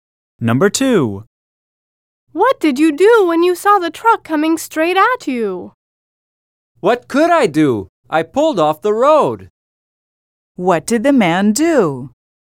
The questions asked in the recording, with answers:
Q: What did the man do?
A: The man said he pulled off the road when he saw the truck coming straight at him.